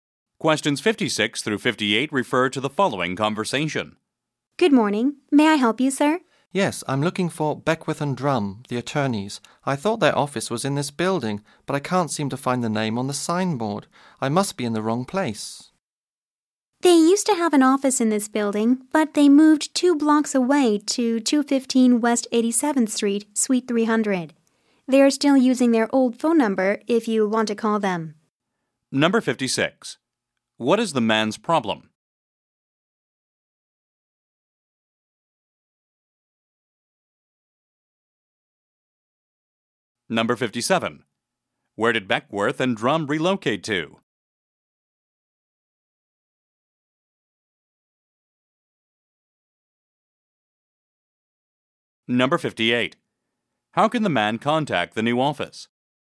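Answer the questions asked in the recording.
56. He can't find the attorneys' office
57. 215 West 87th Street, Suite 300
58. By calling their old phone number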